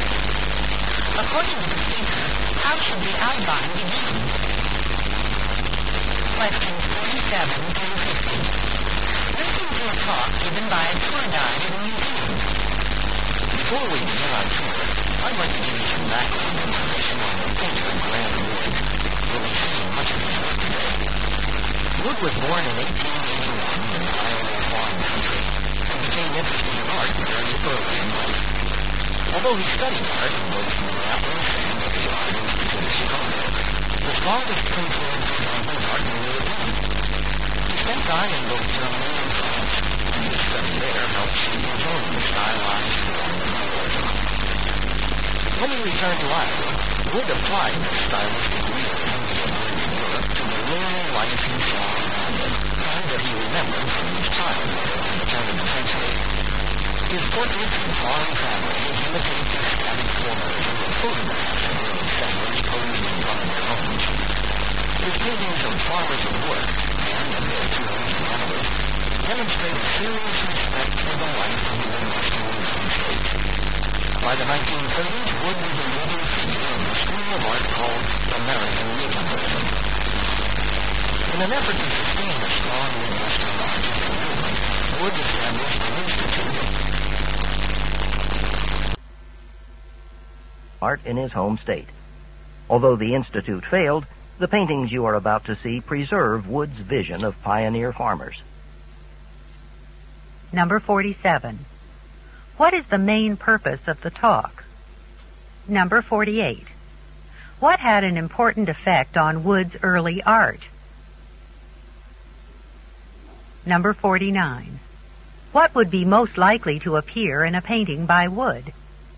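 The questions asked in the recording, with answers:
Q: What is the main purpose of the talk?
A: To give background information on the painter Grant Wood

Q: What would be most likely to appear in a painting by Wood?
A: A Midwestern farm family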